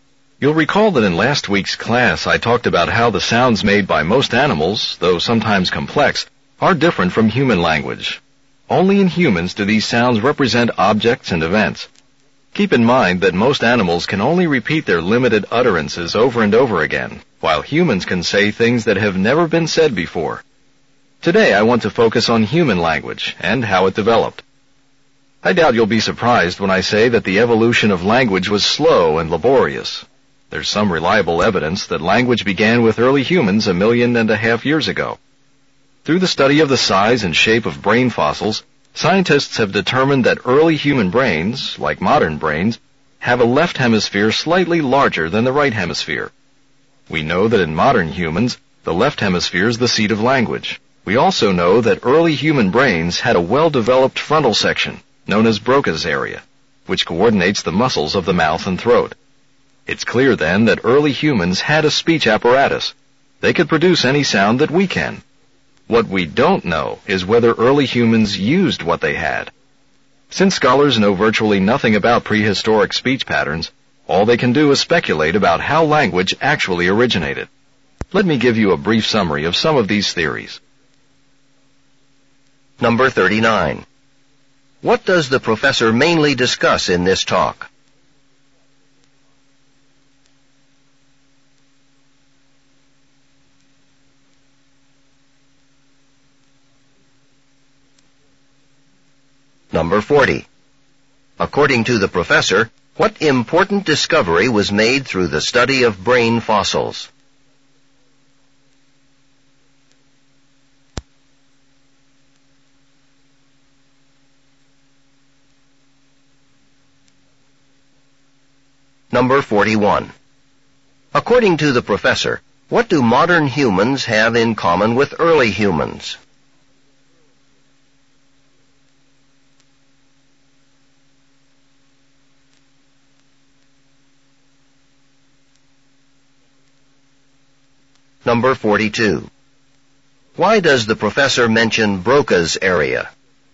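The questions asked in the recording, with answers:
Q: What does the professor mainly discuss in this talk?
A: How human language developed

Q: According to the professor, what important discovery was made through the study of brain fossils?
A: Early human brains had a left hemisphere slightly larger than the right

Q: Why does the professor mention Broca's area?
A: To show that early humans had the physical ability to speak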